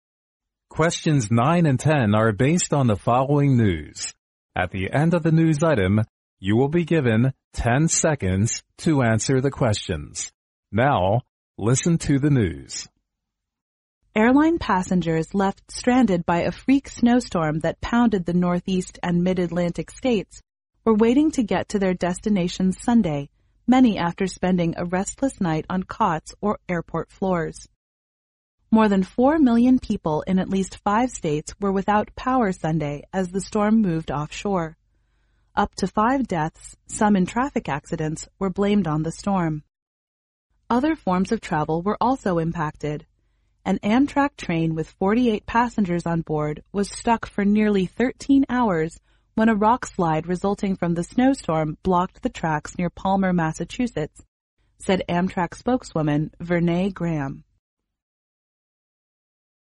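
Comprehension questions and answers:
Now listen to the news.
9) What is the news item mainly about?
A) The influence of a freak snowstorm.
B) The big power failure in at least five states.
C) The traffic accidents on Sunday.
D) Travel forms in Northeast and Mid-Atlantic states.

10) How many passengers on an Amtrak train were stuck for nearly 13 hours?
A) 5.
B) 30.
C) 15.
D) 48.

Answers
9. A
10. D

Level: 英语四级

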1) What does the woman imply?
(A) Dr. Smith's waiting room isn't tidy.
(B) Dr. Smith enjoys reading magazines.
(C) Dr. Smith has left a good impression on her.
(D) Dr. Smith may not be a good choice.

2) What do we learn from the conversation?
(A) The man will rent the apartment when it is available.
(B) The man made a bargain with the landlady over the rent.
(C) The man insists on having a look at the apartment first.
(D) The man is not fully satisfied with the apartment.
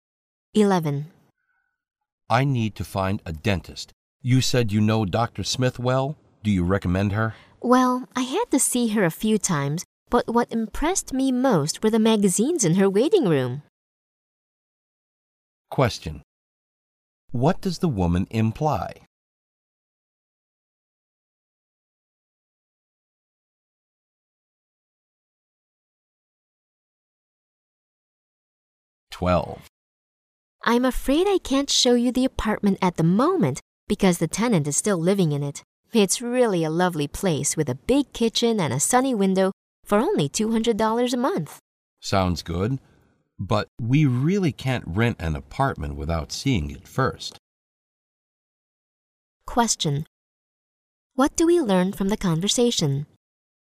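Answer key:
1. D
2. C

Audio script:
M: I need to find a dentist; you said you know Dr. Smith well, do you recommend her?
W: Well, I had to see her a few times, but what impressed me most was the magazines in her waiting room.
Q: What does the woman imply?
W: I'm afraid I can't show you the apartment at the moment, because the tenant is still living in it. It's really a lovely place with a big kitchen and a sunny window for only two hundred dollars a month.
M: Sounds good, but we really can't rent an apartment without seeing it first.
Q: What do we learn from the conversation?

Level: 六级

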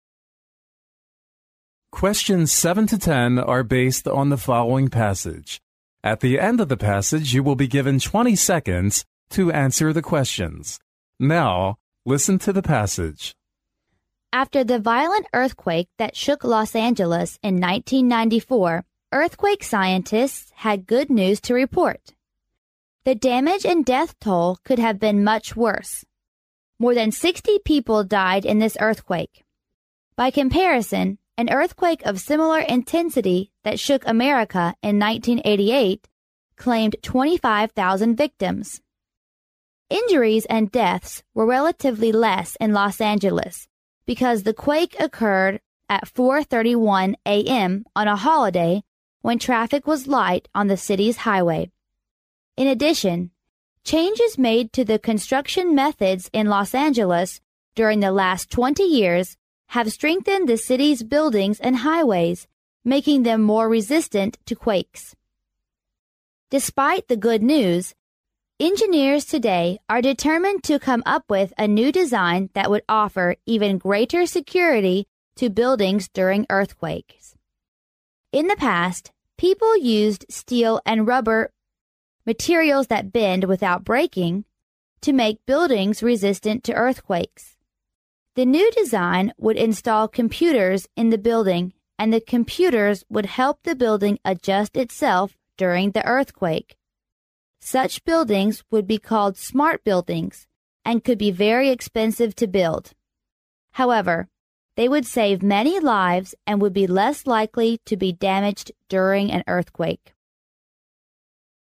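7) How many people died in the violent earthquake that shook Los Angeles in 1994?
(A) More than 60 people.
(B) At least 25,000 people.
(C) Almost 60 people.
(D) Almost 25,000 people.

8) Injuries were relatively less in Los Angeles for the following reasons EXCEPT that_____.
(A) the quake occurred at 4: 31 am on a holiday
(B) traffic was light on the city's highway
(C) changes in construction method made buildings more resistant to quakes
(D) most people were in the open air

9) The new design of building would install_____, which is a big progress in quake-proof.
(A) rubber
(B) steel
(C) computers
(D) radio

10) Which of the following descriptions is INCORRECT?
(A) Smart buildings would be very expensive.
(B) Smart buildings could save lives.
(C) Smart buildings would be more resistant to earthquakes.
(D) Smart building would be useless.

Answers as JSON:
{"7": "A", "8": "D", "9": "C", "10": "D"}

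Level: 英语四级

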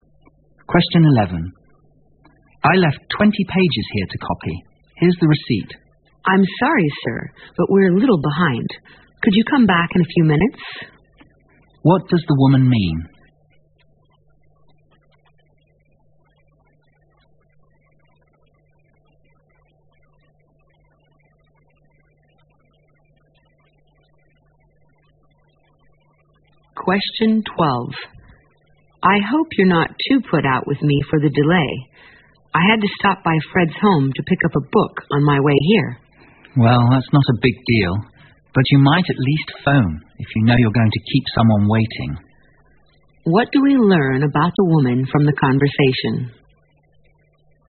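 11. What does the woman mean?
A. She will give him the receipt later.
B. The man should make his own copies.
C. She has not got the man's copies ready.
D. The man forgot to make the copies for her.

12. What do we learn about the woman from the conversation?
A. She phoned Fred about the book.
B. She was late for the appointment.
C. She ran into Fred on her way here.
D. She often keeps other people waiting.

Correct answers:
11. C
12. B

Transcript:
M:I left 20 pages here to copy. Here is the receipt.
W:I'm sorry, sir. But we're a little behind. Could you come back in a few minutes?
Q:What does the woman mean?
W:I hope you're not too put out with me for the delay. I have to stop by friends' home to pick up a book on my way here.
M:Well, that's not a big deal. But you might at least phone if you know you're going to keep someone waiting.
Q: What do we learn about the woman from the conversation?

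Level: 六级

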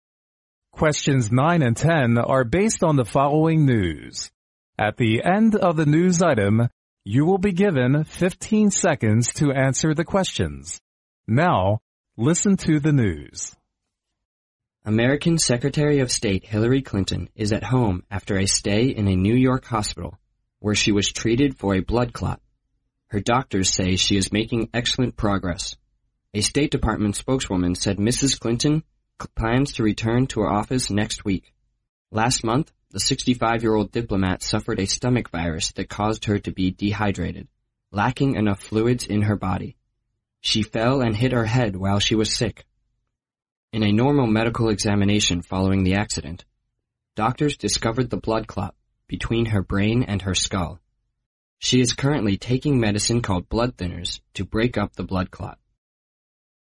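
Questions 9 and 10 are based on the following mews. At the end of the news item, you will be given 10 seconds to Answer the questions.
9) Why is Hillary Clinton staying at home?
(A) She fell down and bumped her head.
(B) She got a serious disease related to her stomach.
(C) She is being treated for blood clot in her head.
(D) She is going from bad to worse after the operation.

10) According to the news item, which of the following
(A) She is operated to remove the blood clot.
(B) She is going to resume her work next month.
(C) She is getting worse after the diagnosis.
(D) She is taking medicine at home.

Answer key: 9C, 10D

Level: 专业四级

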